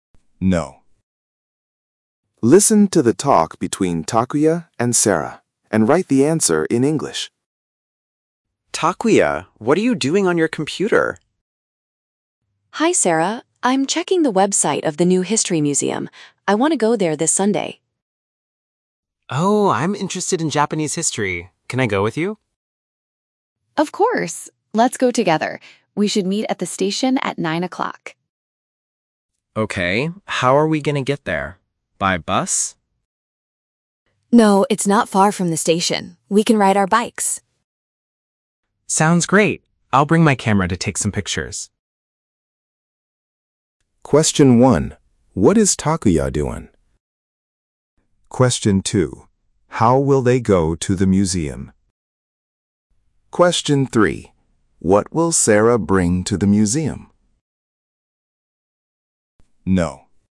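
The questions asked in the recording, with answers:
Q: What is Takuya doing?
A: He is checking the website of the new History Museum.

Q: How will they go to the museum?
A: By bike.

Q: What will Sarah bring to the museum?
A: Her camera.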